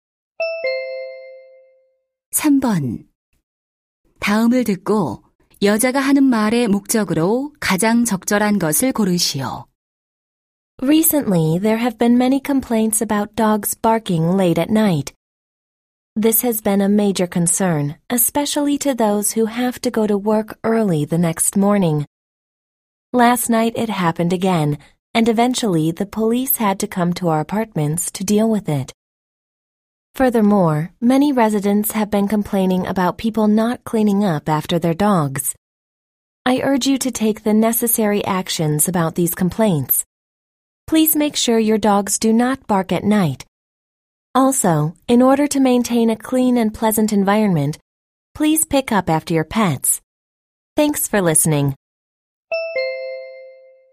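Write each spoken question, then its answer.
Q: 다음을 듣고 여자가 하는 말의 목적으로 가장 적절한 것을 고르시오.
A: 반려견이 밤에 짖지 않게 하고 배설물을 치우도록 주민들에게 요청하려고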